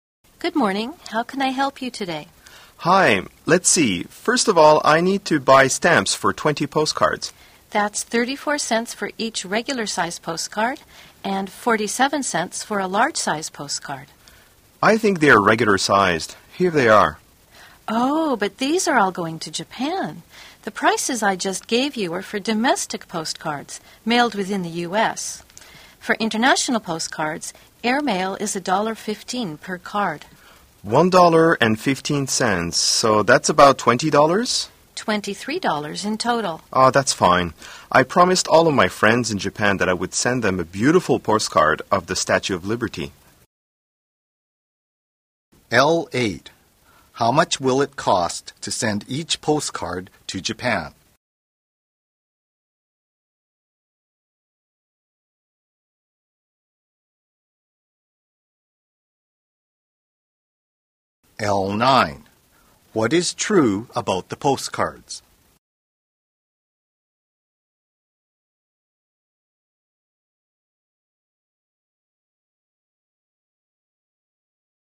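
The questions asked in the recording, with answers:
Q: How much will it cost to send each postcard to Japan?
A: $1.15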